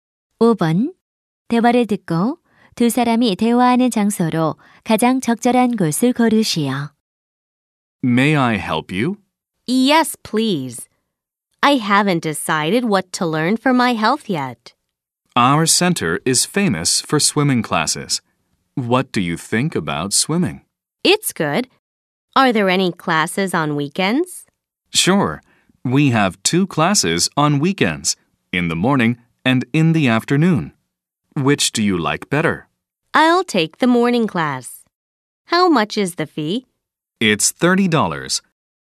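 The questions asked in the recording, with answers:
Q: 대화를 듣고 두 사람이 대화하는 장소로 가장 적절한 곳을 고르시오.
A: 스포츠 센터(수영장)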